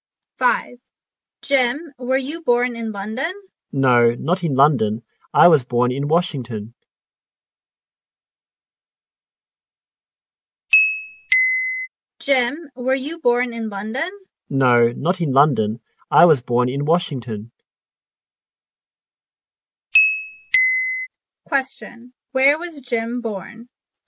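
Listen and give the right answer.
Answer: In Washington.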